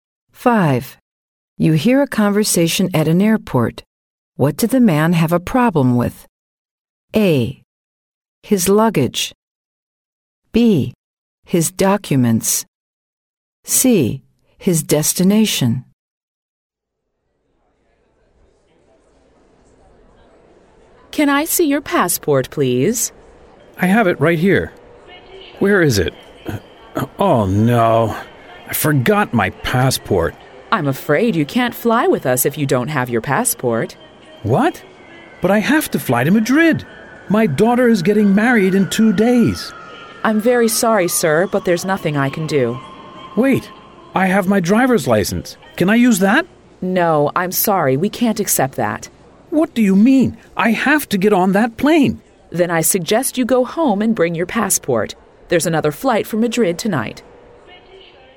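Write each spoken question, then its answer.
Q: What did the man have a problem with?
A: B: His documents.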